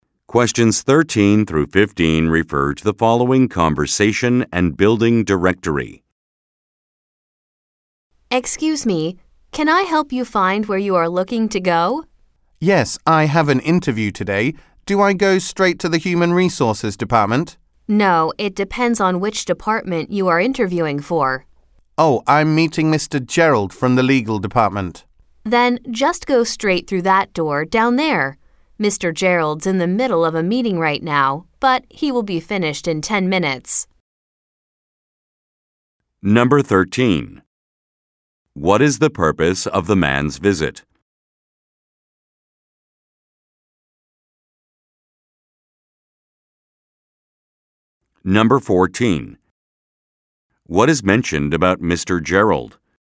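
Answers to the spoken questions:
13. To attend a job interview
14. He is in a meeting and will be finished in 10 minutes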